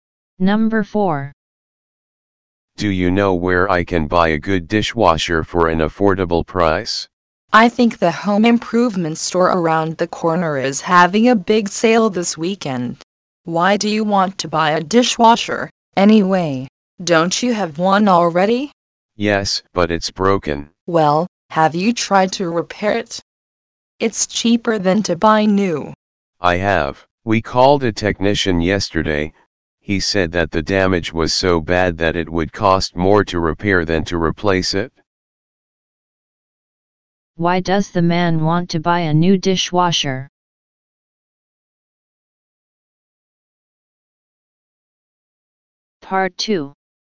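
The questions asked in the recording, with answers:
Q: Why does the man want to buy a new dishwasher?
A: His old one is broken and would cost more to repair than to replace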